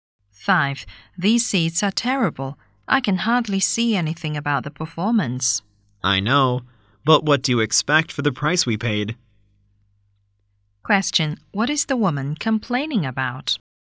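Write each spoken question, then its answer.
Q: What is the woman complaining about?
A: The bad seats; she can hardly see the performance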